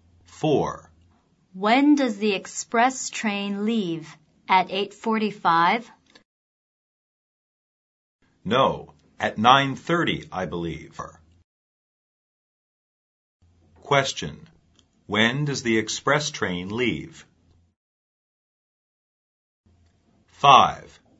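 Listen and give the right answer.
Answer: At 9:30.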